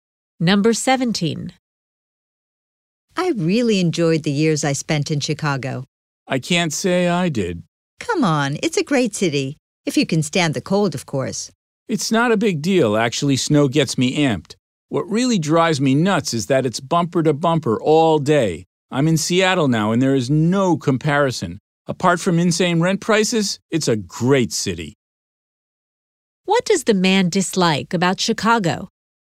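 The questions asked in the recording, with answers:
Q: What does the man dislike about Chicago?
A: The traffic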